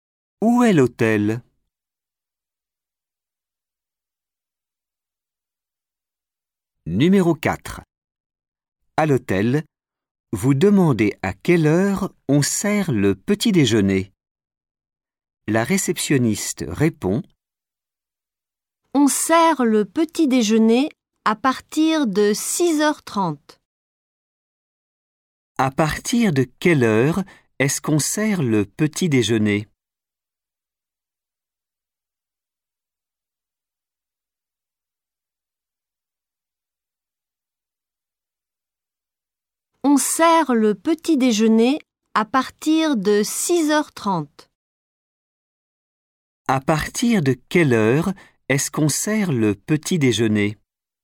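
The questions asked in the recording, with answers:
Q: À partir de quelle heure est-ce qu'on sert le petit déjeuner?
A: 6h30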